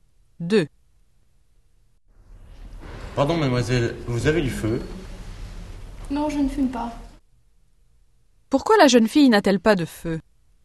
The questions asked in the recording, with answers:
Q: Pourquoi la jeune fille n'a-t-elle pas de feu?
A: Parce qu'elle ne fume pas.